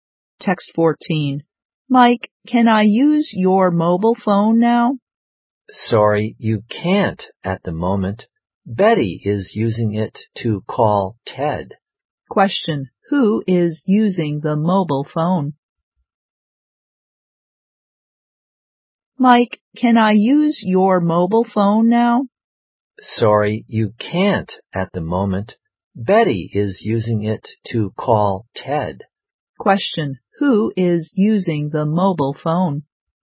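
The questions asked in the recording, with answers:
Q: who is using the mobile phone?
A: Betty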